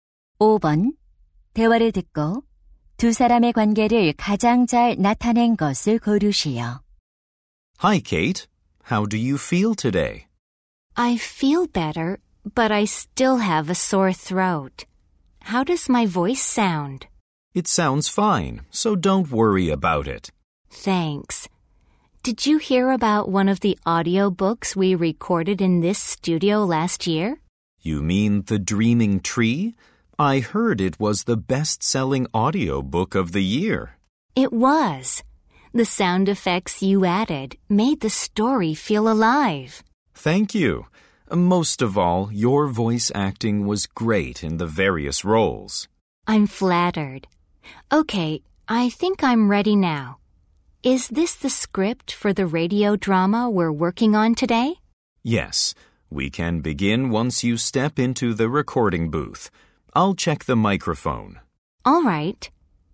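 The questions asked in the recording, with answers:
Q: 대화를 듣고 두 사람의 관계를 가장 잘 나타낸 것을 고르시오.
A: 음향 기술자 - 성우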